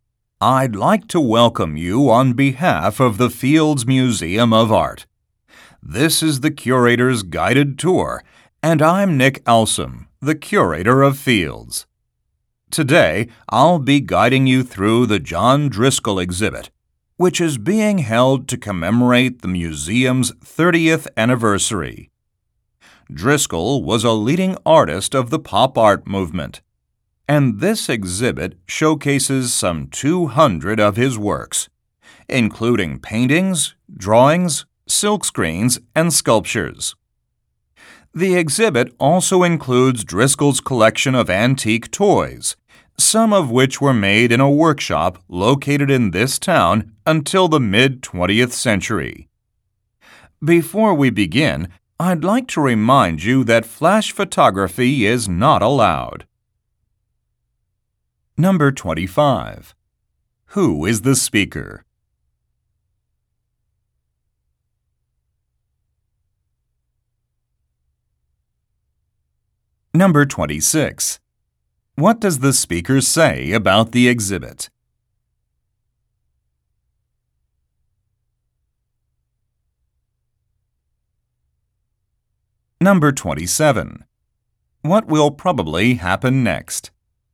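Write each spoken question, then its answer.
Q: Who is the speaker?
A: A museum curator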